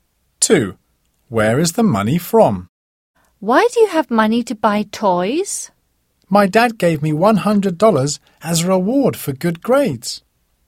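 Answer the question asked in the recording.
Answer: Her dad, as a reward for good grades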